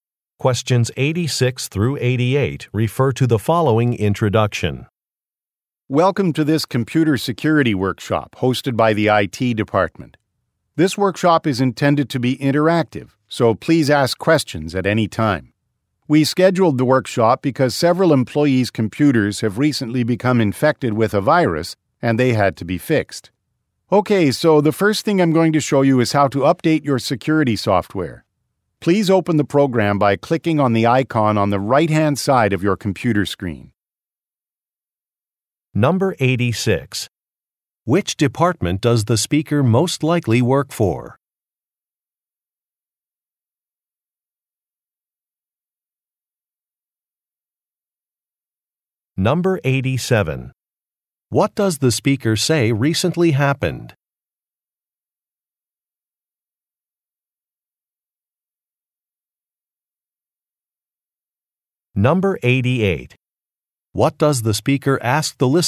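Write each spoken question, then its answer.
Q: Which department does the speaker most likely work for?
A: The IT department

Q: What does the speaker say recently happened?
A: Several employees' computers were infected with a virus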